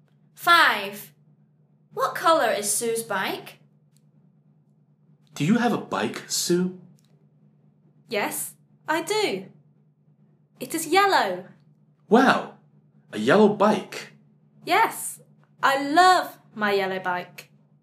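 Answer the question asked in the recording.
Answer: yellow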